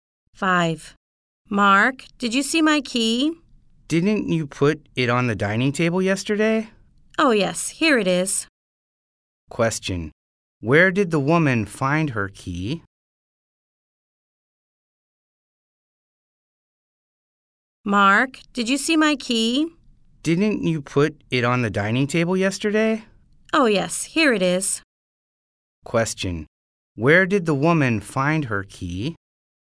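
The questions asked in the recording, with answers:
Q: Where did the woman find her key?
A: On the dining table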